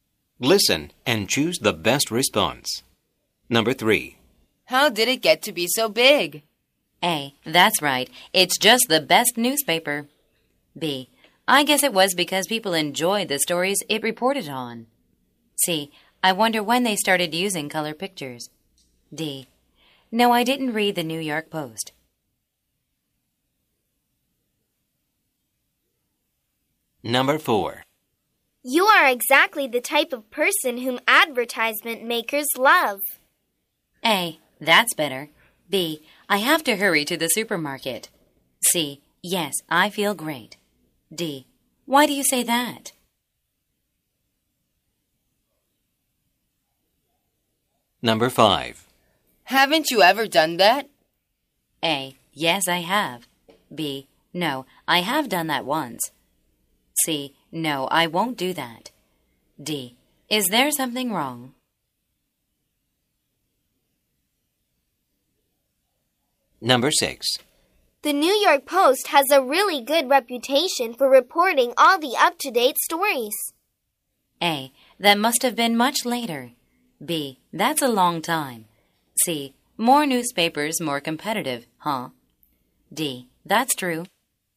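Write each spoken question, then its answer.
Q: How did it get to be so big?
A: B: I guess it was because people enjoyed the stories it reported on.

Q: You are exactly the type of person whom advertisement makers love.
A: D: Why do you say that?

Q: The New York Post has a really good reputation for reporting all the up-to-date stories.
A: D: That's true.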